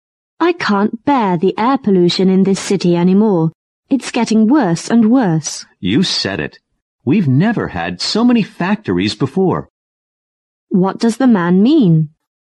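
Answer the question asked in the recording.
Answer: He agrees; the many factories are making the pollution worse.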